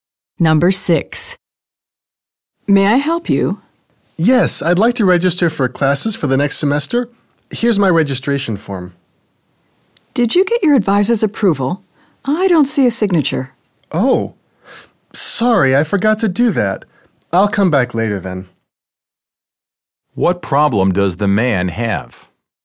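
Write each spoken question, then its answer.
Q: What problem does the man have?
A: His form lacks his advisor's signature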